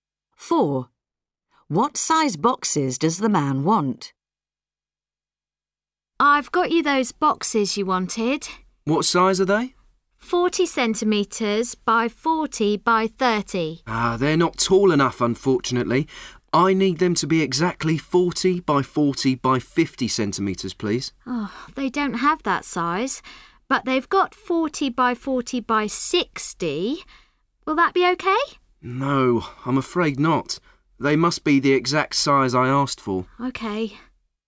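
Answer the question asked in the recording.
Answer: 40 by 40 by 50 centimetres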